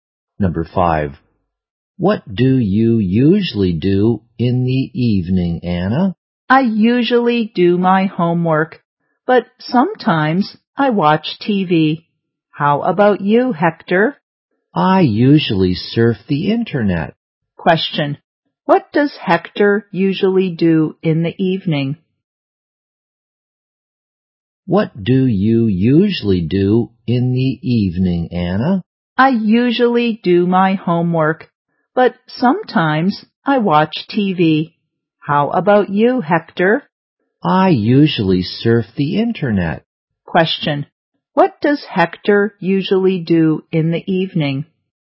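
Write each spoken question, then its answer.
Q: what does Hector usually do in the evening?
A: He surfs the internet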